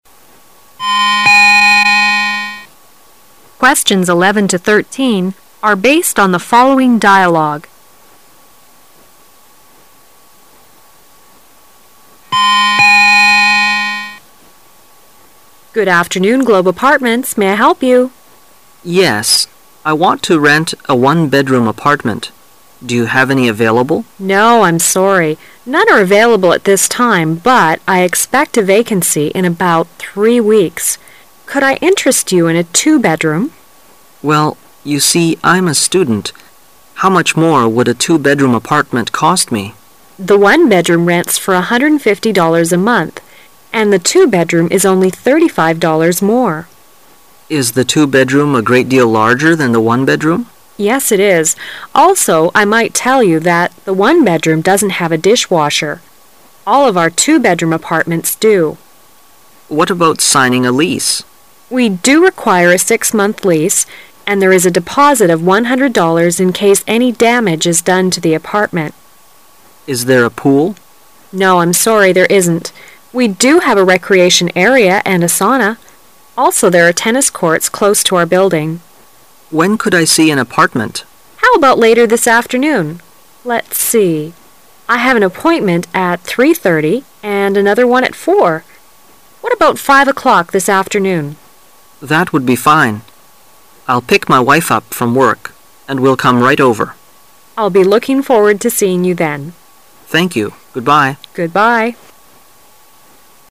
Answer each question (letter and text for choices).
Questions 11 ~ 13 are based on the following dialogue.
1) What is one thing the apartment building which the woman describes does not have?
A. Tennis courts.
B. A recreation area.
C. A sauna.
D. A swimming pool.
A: D. A swimming pool.

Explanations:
11-13 W: Good afternoon. Globe Apartments. May I help you? M: Yes, I want to rent a one-bed-room apartment. Do you have any available? W: No, I'm sorry. None are available at this time, but I expect a vacancy in about three weeks. Could I interest you in a two-bedroom? M: Well, you see, I'm a student, how much more would a two-bedroom apartment cost me? W: The one-bedroom rents for $ 1 150 a month and the two-bedroom is only thirty-five dollars more. M: Is the two-bedroom a great deal larger than the one-bedroom? W: Yes, it is. Also, I might tell you that the one-bedroom doesn't have a dishwasher. All of our two-bedroom apartments do. M: What about signing a lease? W: We do require a 6-month lease, and there is a deposit of $ 1 100 in case any damage is done to the apartment. M: Is there a pool? W: No, I'm sorry, there isn't. We do have a recreation area and a sauna. Also, there are tennis courts close to our building. M: When could I see an apartment? W: How about later this afternoon? Let's see. I have an appointment at three thirty and another one at four. What about five o'clock this afternoon? M: That would be fine. I'll pick my wife up from work, and we'll come right over. W: I'll be looking forward to seeing you then. M: Thank you. Goodbye. W: Goodbye.